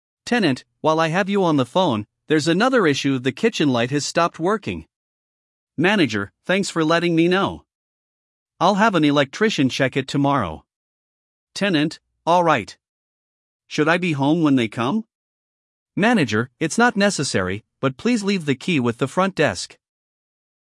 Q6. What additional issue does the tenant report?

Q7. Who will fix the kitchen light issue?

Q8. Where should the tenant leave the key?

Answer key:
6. Kitchen light not working
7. Electrician
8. Front desk

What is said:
Tenant: While I have you on the phone, there's another issue—the kitchen light has stopped working.
Manager: Thanks for letting me know. I'll have an electrician check it tomorrow.
Tenant: Alright. Should I be home when they come?
Manager: It's not necessary, but please leave the key with the front desk.